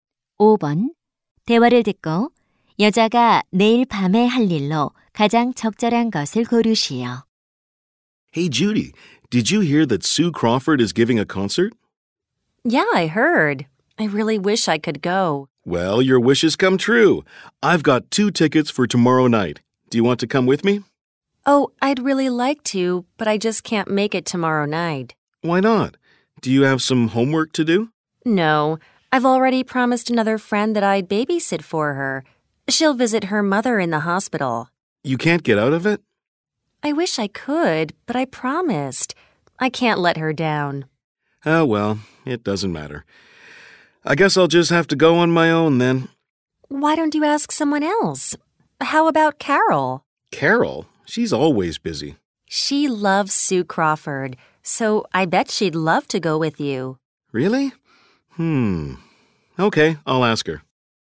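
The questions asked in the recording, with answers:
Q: 대화를 듣고 여자가 내일 밤에 할 일로 가장 적절한 것을 고르시오.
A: 친구의 아이 돌보기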